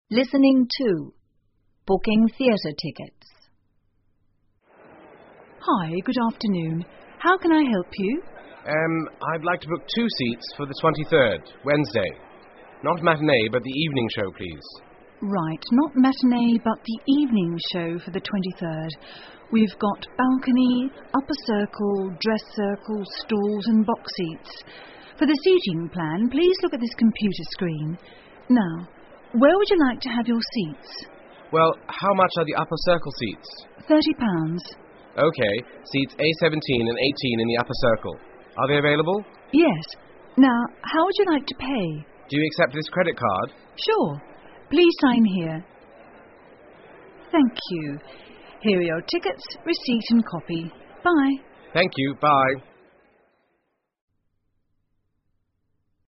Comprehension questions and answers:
下面是对话部分的内容, 请再听一次对话,在空格内填入遗漏的部分。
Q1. Customer: Urm, I'd like to ___________two seats ____________the 23rd, Wednesday, _________matinee ____________the evening show, please.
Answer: book, for ,Not but,

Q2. C: Ok... Seats A-17 and 18 in the _________Circle... are they _______________?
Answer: Upper, available

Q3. C: Do you ___________this credit card?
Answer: accept

请根据对话内容,判断下面句子是否正确,如果符合广播内容,请在T(true)做记号,如果不符合,请在F(false)做记号。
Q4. No ticket is available on Wednesday.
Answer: F

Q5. Only the evening show is performed on Wednesday.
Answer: F

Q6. The seating plan can be seen on a computer screen.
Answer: T

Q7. The total price for the two seats is £30.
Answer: F

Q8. The customer booked Dress Circle seats.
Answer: F

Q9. What day of the week would the customer like to book?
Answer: Wednesday

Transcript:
Ticket Sales Assistant: Hi, good afternoon. How can I help you?
Customer: Urm, I'd like to book two seats for the 23rd, wednesday.Not matinee but the evening show, please.
TSA: Right, not matinee but the evening show for the 23rd....We've got Balcony, Upper Circle, Dress Circle, Stalls and Box Seats. For the seating plan, please look at this computer screen. Now, where would like to have your seats?
C: Well...how much are the Upper Circle seats?
C: OK...Seats A-17 and 18 in the Upper Circle...are they available?
TSA: Yes. Now, how would you like to pay?
C: Do you accept this credit card?
TSA: Sure.Please sign here...Thank you, here are your tickets, receipt and copy. Bye
C: Thank you, bye.